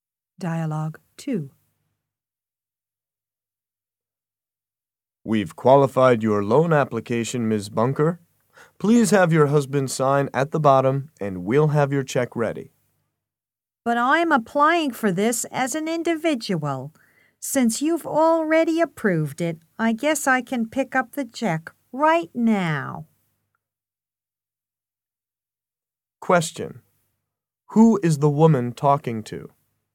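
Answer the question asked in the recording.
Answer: A bank loan officer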